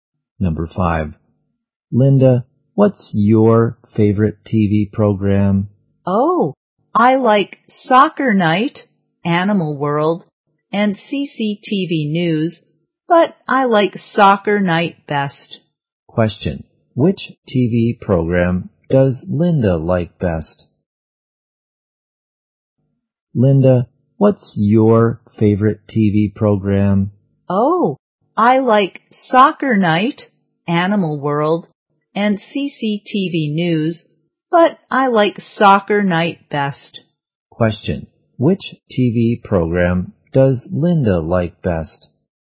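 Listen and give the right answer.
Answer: Soccer Night.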